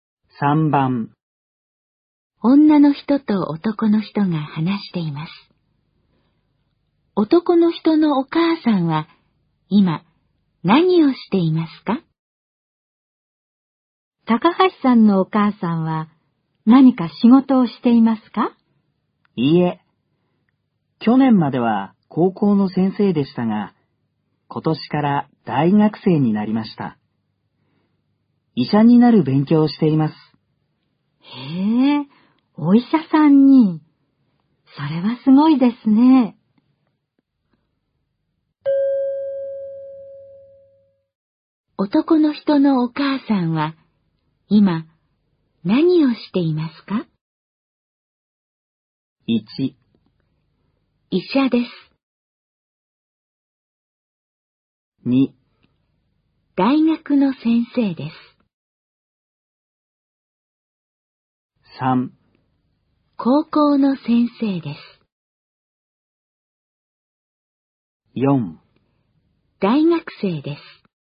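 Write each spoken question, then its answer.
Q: 男の人のお母さんは今何をしていますか?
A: 4: 大学生です。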